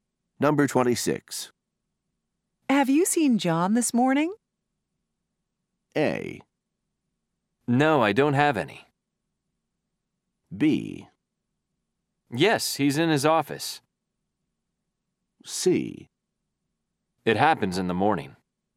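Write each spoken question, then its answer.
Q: Have you seen John this morning?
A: B: Yes, he's in his office.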